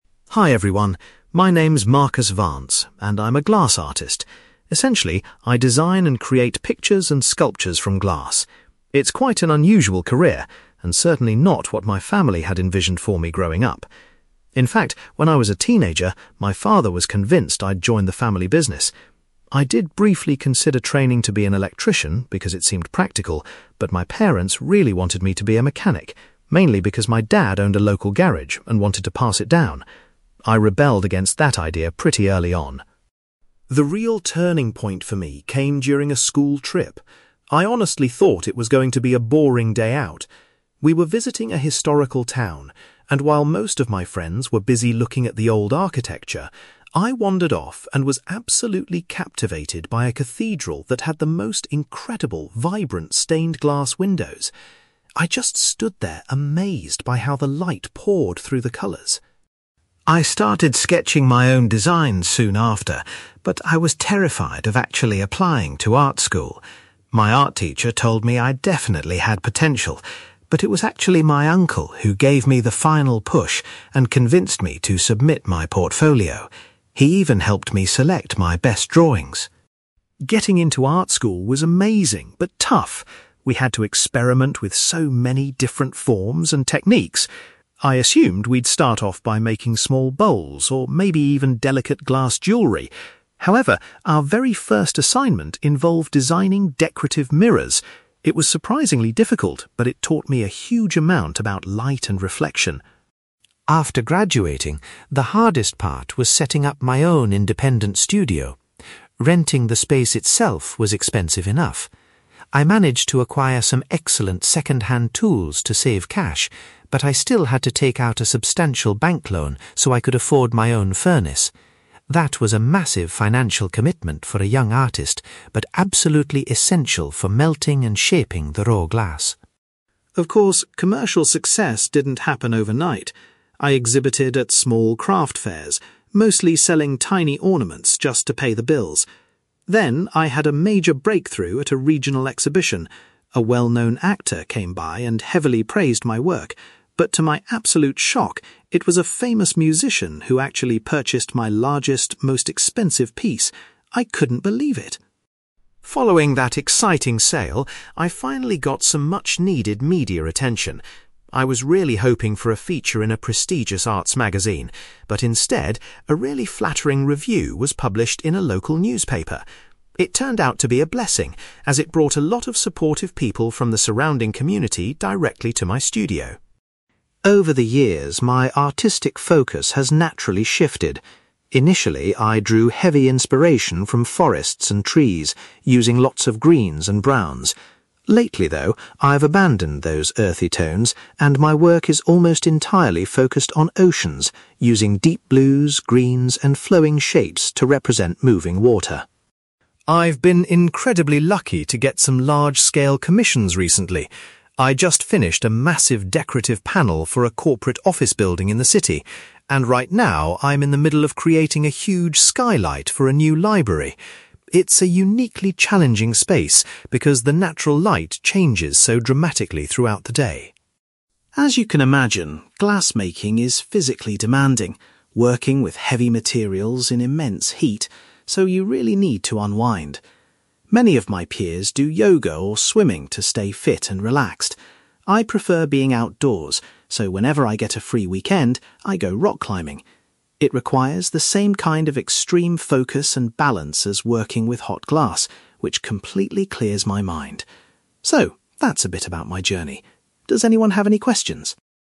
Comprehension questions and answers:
You will hear a glass artist called Marcus Vance talking about his life and career. For questions 9-18, complete the sentences with a word or short phrase.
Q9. Marcus's parents hoped that he would choose a career as a (9)........................... .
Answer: mechanic

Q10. Marcus was deeply inspired after seeing the windows of a (10)........................... on a school trip.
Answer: cathedral

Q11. Marcus was finally persuaded to apply to art school by his (11)........................... .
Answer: uncle

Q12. During his first project at art school, Marcus learned how to make (12)........................... .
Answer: mirrors

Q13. Marcus needed to borrow money in order to buy a (13)........................... for his new studio.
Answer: furnace

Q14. Marcus was incredibly surprised when a (14)........................... bought his biggest artwork.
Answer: musician

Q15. Marcus was pleased when his work received a highly positive review in a (15)........................... .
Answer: local newspaper

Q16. Currently, Marcus bases the majority of his glass designs on (16)........................... .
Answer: oceans

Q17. Marcus is presently working on a glass roof project for a (17)........................... .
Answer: library

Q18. Marcus finds that doing (18)........................... helps him relax and stay focused in his free time.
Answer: rock climbing

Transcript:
Marcus : Hi everyone. My name's Marcus Vance, and I'm a glass artist. Essentially, I design and create pictures and sculptures from glass. It's quite an unusual career, and certainly not what my family had envisioned for me growing up. In fact, when I was a teenager, my father was convinced I'd join the family business. I did briefly consider training to be an electrician because it seemed practical, but my parents really wanted me to be a mechanic, mainly because my dad owned a local garage and wanted to pass it down. I rebelled against that idea pretty early on.
The real turning point for me came during a school trip. I honestly thought it was going to be a boring day out. We were visiting a historical town, and while most of my friends were busy looking at the old architecture, I wandered off and was absolutely captivated by a cathedral that had the most incredible, vibrant stained-glass windows. I just stood there amazed by how the light poured through the colours.
I started sketching my own designs soon after, but I was terrified of actually applying to art school. My art teacher told me I definitely had potential, but it was actually my uncle who gave me the final push and convinced me to submit my portfolio. He even helped me select my best drawings.
Getting into art school was amazing but tough. We had to experiment with so many different forms and techniques. I assumed we'd start off by making small bowls, or maybe even delicate glass jewelry. However, our very first assignment involved designing decorative mirrors. It was surprisingly difficult, but it taught me a huge amount about light and reflection.
After graduating, the hardest part was setting up my own independent studio. Renting the space itself was expensive enough. I managed to acquire some excellent second-hand tools to save cash, but I still had to take out a substantial bank loan so I could afford my own furnace. That was a massive financial commitment for a young artist, but absolutely essential for melting and shaping the raw glass.
Of course, commercial success didn't happen overnight. I exhibited at small craft fairs, mostly selling tiny ornaments just to pay the bills. Then, I had a major breakthrough at a regional exhibition. A well-known actor came by and heavily praised my work, but to my absolute shock, it was a famous musician who actually purchased my largest, most expensive piece! I couldn't believe it.
Following that exciting sale, I finally got some much-needed media attention. I was really hoping for a feature in a prestigious arts magazine, but instead, a really flattering review was published in a local newspaper. It turned out to be a blessing, as it brought a lot of supportive people from the surrounding community directly to my studio.
Over the years, my artistic focus has naturally shifted. Initially, I drew heavy inspiration from forests and trees, using lots of greens and browns. Lately, though, I've abandoned those earthy tones and my work is almost entirely focused on oceans, using deep blues, greens, and flowing shapes to represent moving water.
I've been incredibly lucky to get some large-scale commissions recently. I just finished a massive decorative panel for a corporate office building in the city, and right now I'm in the middle of creating a huge skylight for a new library. It's a uniquely challenging space because the natural light changes so dramatically throughout the day.
As you can imagine, glass making is physically demanding, working with heavy materials in immense heat, so you really need to unwind. Many of my peers do yoga or swimming to stay fit and relaxed. I prefer being outdoors, so whenever I get a free weekend, I go rock climbing. It requires the same kind of extreme focus and balance as working with hot glass, which completely clears my mind. So, that's a bit about my journey. Does anyone have any questions?

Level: B2